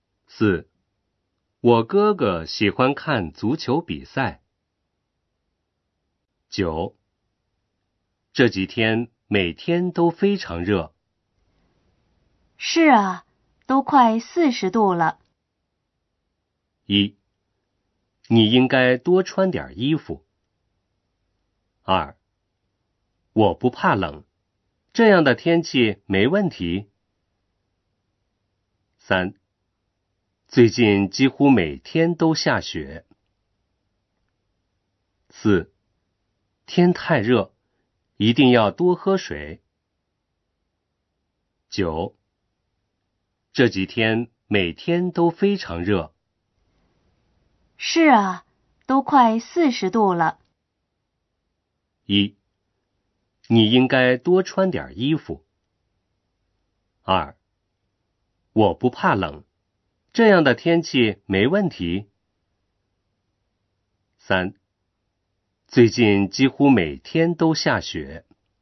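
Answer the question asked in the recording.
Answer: 四: 天太热,一定要多喝水。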